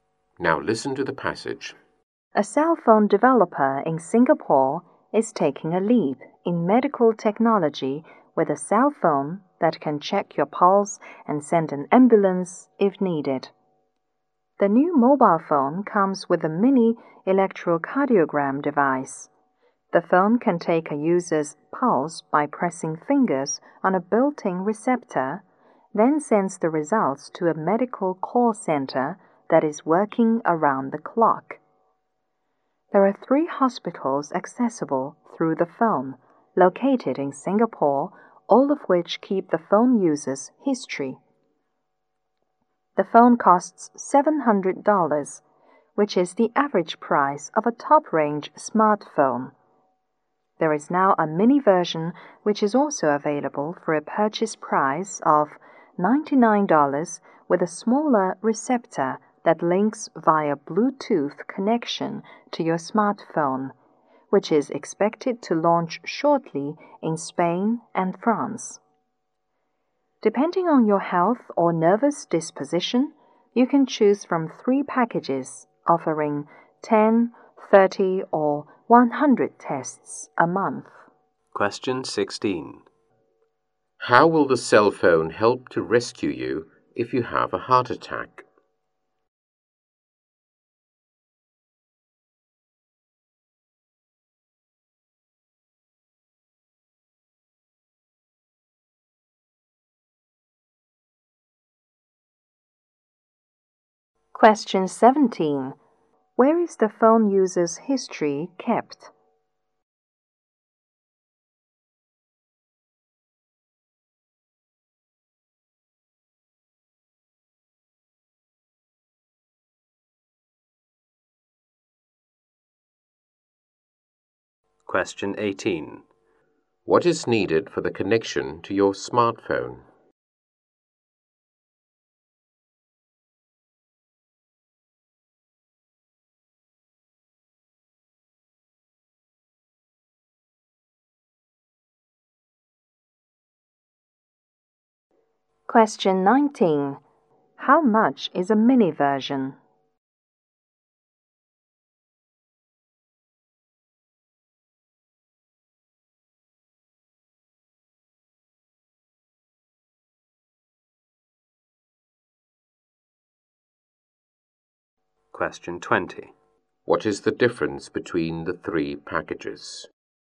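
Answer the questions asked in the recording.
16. By sending an ambulance
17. In 3 hospitals in Singapore
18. Bluetooth
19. $99
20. The number of tests a month (10, 30 or 100)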